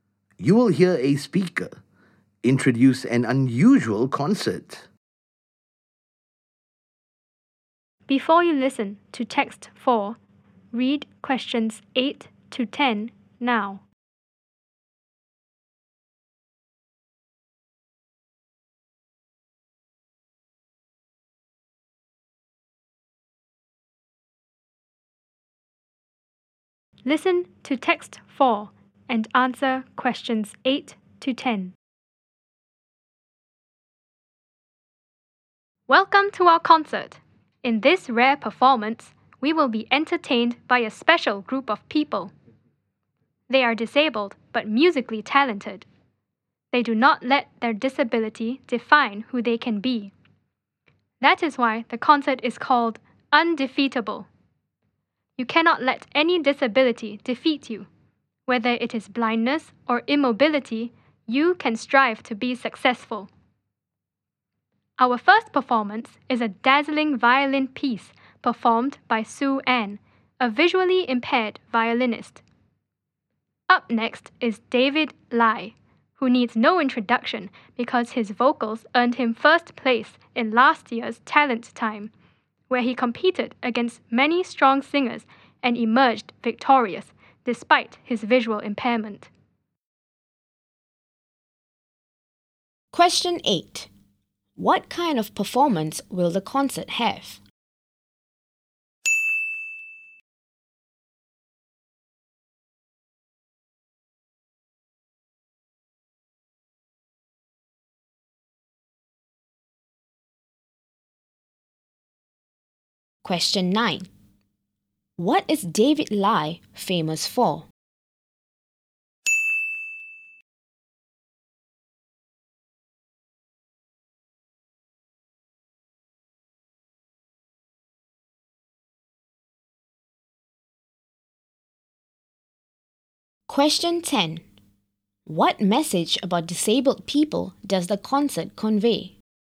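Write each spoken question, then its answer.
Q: What is David Lai famous for?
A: His singing; he won first place in last year's Talent Time

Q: What message about disabled people does the concert convey?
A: Disability cannot defeat them; they can strive to be successful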